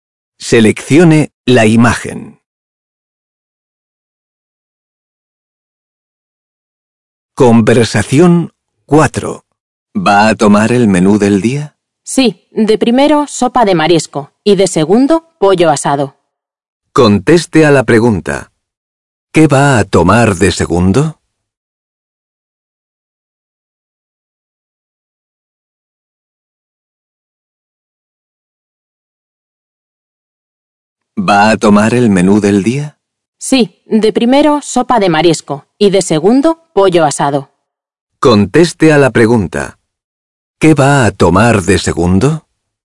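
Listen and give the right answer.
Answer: Pollo asado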